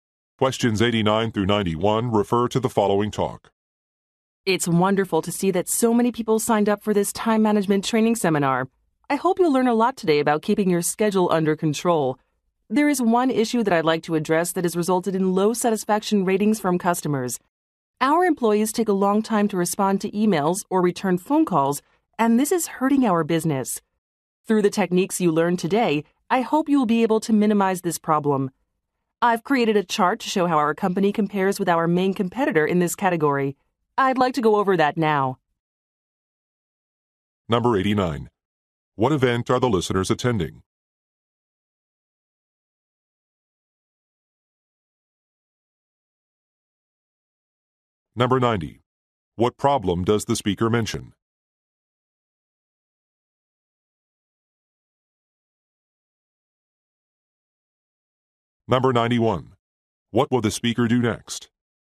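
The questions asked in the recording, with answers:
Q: What event are the listeners attending?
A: A time management training seminar

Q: What problem does the speaker mention?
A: Slow responses to customer emails and calls

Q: What will the speaker do next?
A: Go over a chart comparing the company with its competitor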